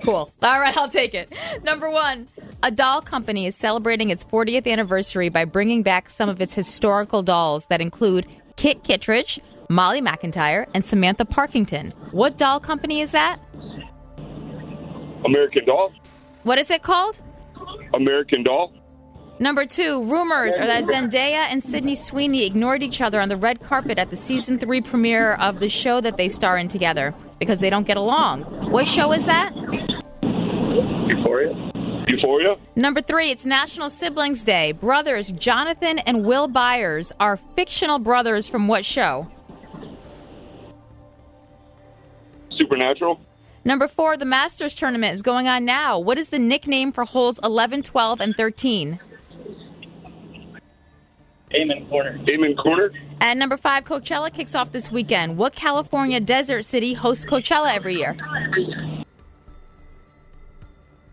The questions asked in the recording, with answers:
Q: What show is that?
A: Euphoria.

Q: What is the nickname for holes 11, 12, and 13?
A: No, Amen Corner.